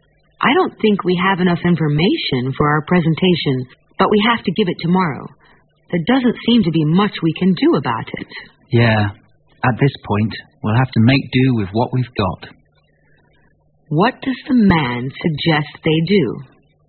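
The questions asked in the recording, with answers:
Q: What does the man suggest they do?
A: Give the presentation with the information they already have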